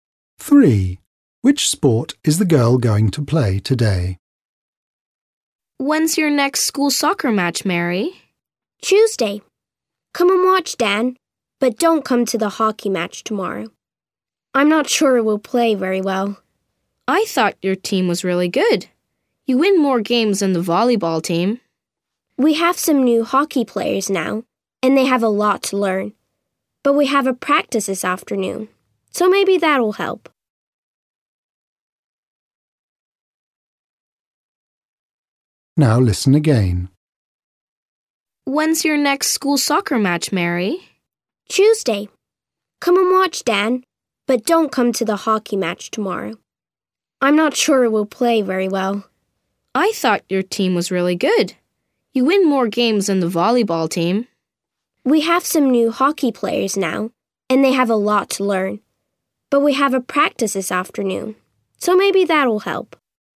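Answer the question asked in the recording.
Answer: hockey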